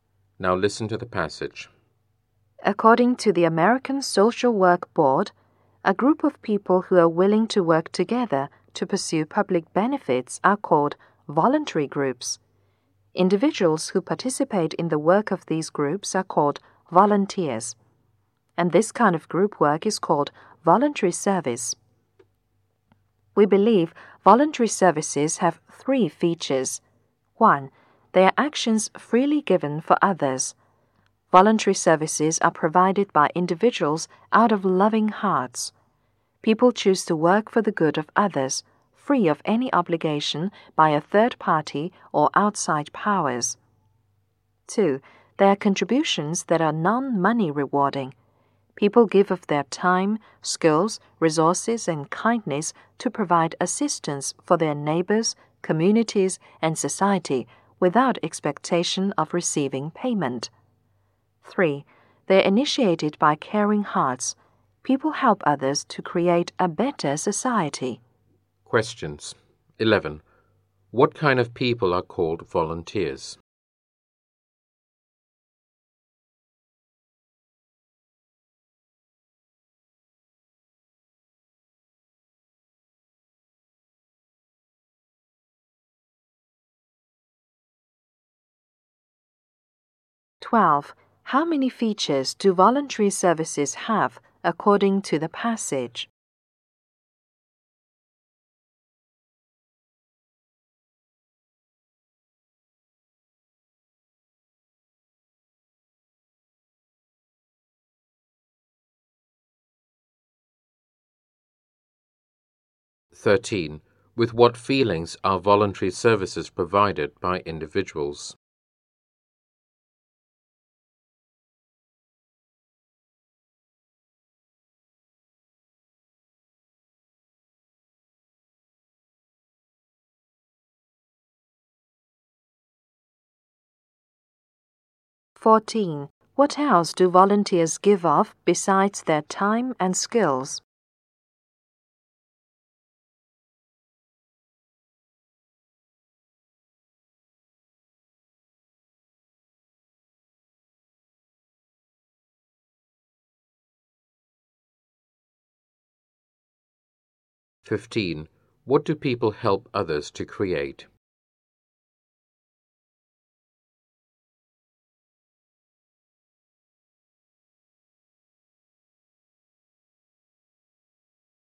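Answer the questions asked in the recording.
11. Individuals who participate in the work of voluntary groups
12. Three
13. Loving hearts
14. Resources and kindness
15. A better society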